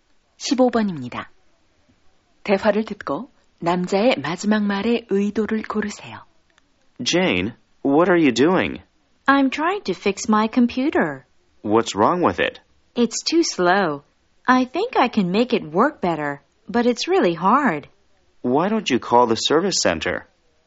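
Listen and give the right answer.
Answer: 제안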